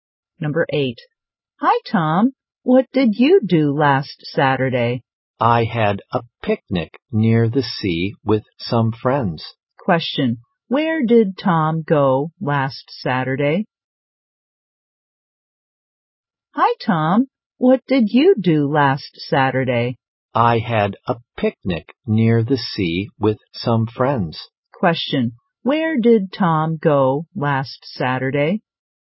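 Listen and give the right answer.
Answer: To the seaside, for a picnic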